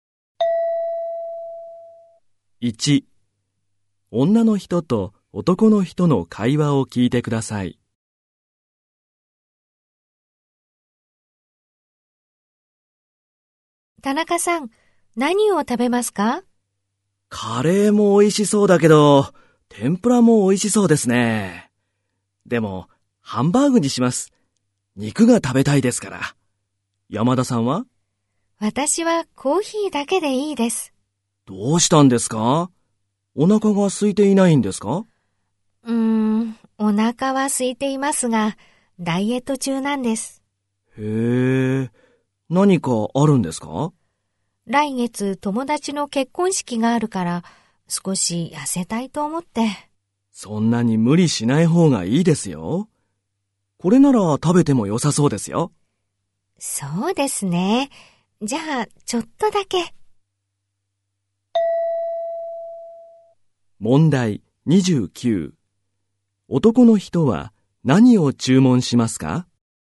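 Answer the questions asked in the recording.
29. ハンバーグ
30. 来月友達の結婚式があるから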